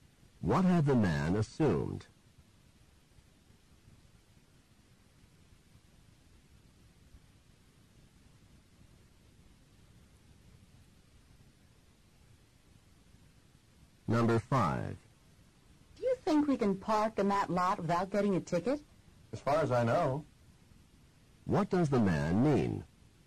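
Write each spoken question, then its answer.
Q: What does the man mean?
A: He thinks they can park there without a ticket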